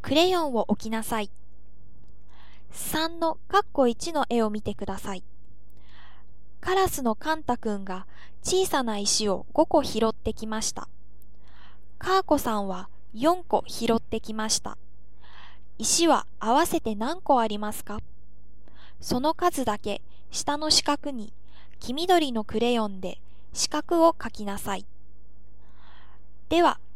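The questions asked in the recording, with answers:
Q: 石は合わせて何個ありますか?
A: 9個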